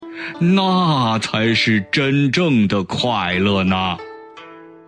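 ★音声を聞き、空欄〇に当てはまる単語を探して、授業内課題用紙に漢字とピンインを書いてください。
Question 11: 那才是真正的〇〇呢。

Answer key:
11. 快乐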